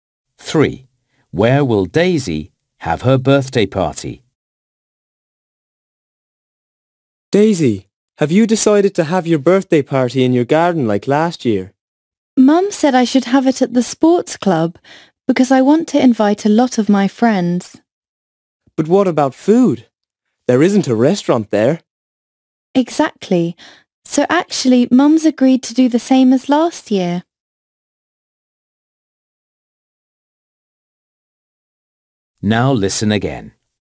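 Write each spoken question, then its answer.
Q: Where will Daisy have her birthday party?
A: In her garden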